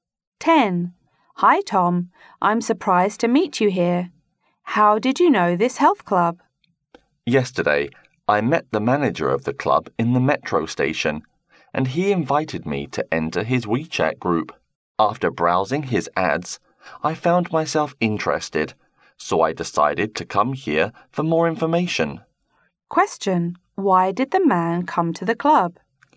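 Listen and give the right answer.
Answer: He saw the club's ads in the manager's WeChat group and wanted more information.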